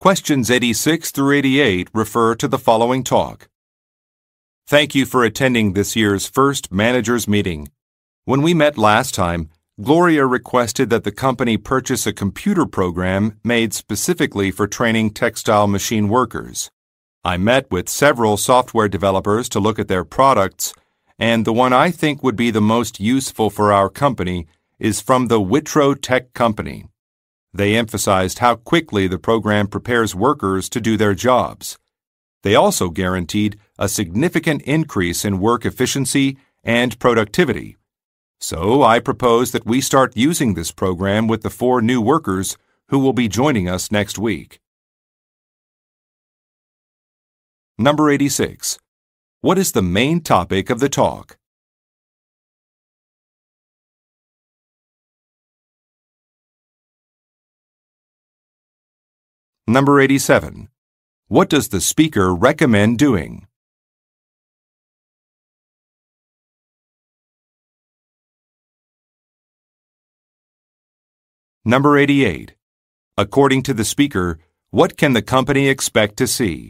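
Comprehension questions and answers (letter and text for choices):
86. What is the main topic of the talk?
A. Changes to a production schedule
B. Instructions for repairing machines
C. Software for teaching work skills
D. Consequences of a recent merger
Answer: C. Software for teaching work skills

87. What does the speaker recommend doing?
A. Comparing service costs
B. Extending staff contracts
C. Talking to a manager after a meeting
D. Beginning a program with new recruits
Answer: D. Beginning a program with new recruits

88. According to the speaker, what can the company expect to see?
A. Increased productivity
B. Higher employee morale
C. Improved sales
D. Better customer relations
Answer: A. Increased productivity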